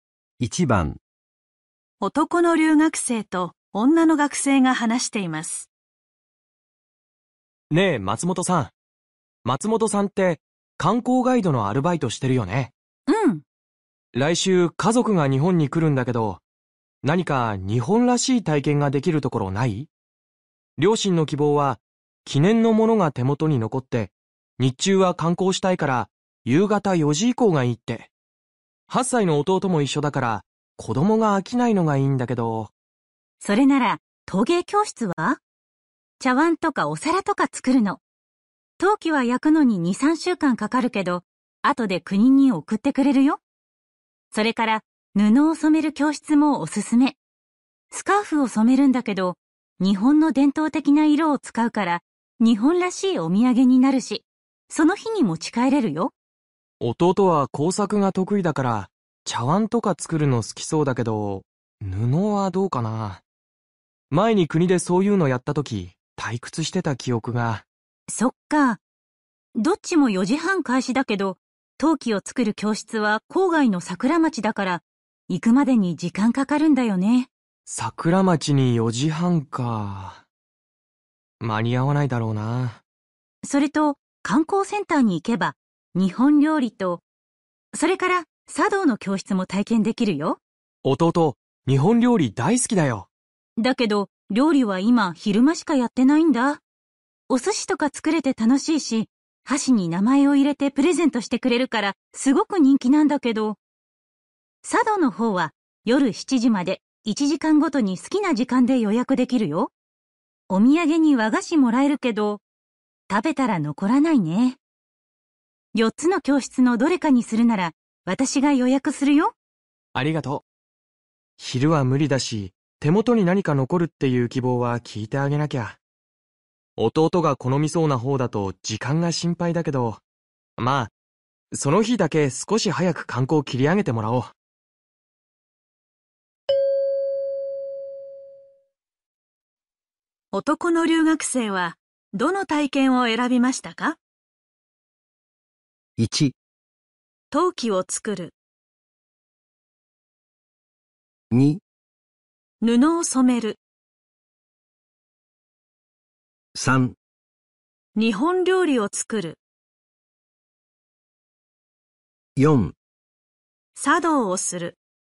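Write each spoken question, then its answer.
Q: 男の留学生は、どの体験を選びましたか?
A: 1: 陶器を作る。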